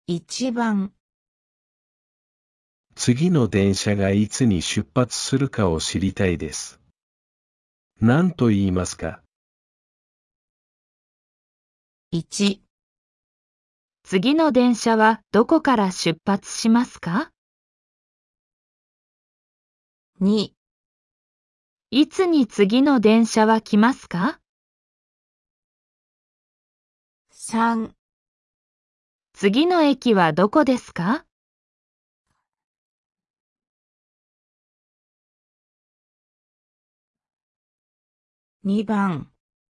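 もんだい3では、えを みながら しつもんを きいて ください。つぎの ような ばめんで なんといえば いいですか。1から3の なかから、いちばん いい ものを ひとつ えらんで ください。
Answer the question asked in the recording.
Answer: 2

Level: N5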